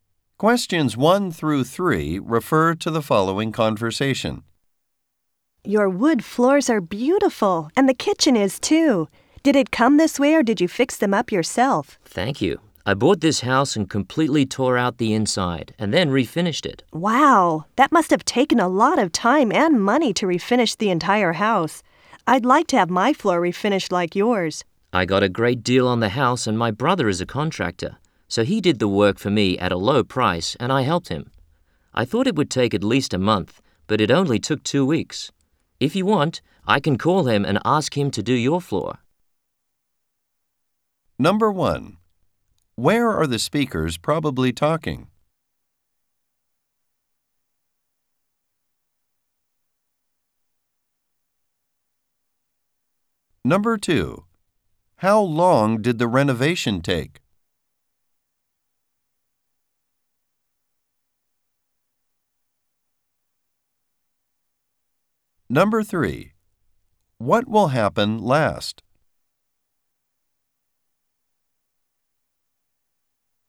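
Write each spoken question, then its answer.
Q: Where are the speakers probably talking?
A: At one speaker's house

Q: How long did the renovation take?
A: 2 weeks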